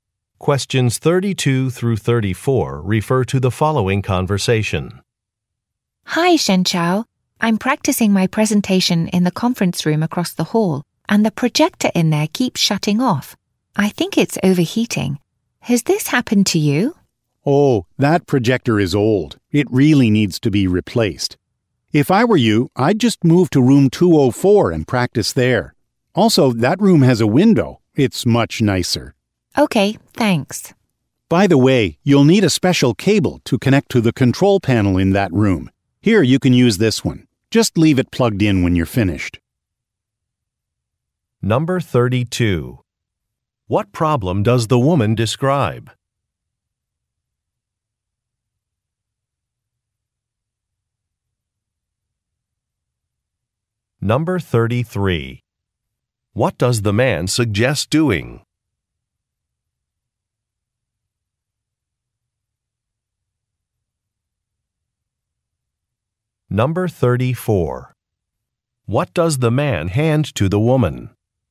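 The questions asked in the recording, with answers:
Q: What problem does the woman describe?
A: The projector keeps shutting off (overheating)

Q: What does the man suggest doing?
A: Moving to room 204 to practice

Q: What does the man hand to the woman?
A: A special cable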